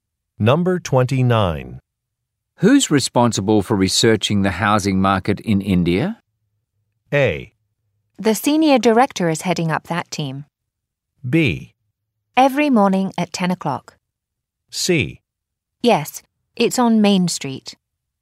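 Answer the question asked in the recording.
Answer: A: The senior director is heading up that team.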